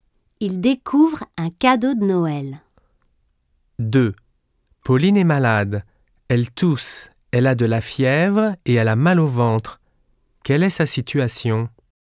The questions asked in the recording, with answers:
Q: Quelle est sa situation?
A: Elle souffre beaucoup.